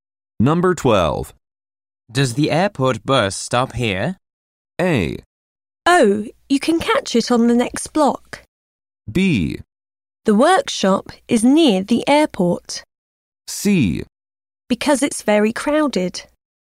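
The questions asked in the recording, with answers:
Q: Does the airport bus stop here?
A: A: Oh, you can catch it on the next block.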